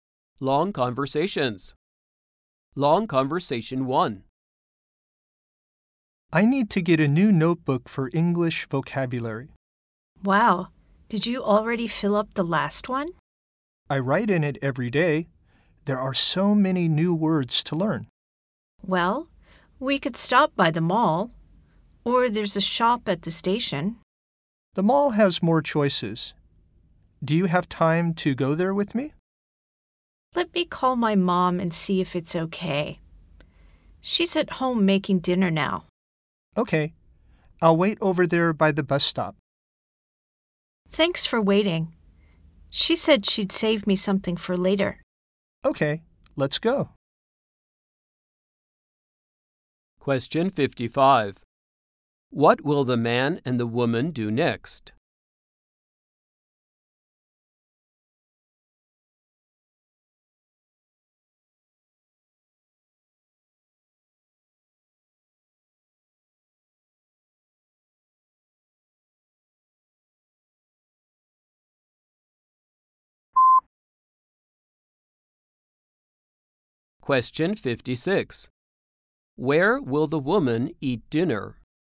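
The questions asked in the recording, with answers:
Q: What will the man and the woman do next?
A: Go to the mall to buy a notebook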